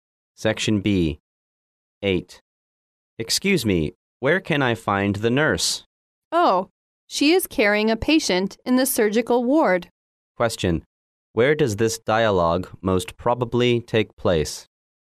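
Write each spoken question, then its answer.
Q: Where does this dialogue most probably take place?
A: In a hospital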